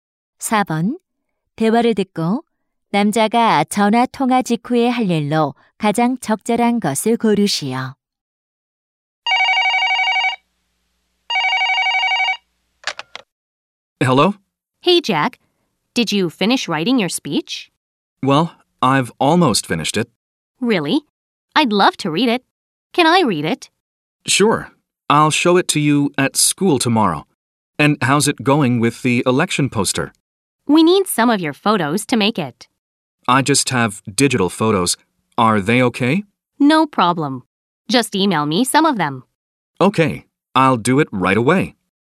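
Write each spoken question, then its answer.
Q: 대화를 듣고 남자가 전화 통화 직후에 할 일로 가장 적절한 것을 고르시오.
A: 사진을 이메일로 보내기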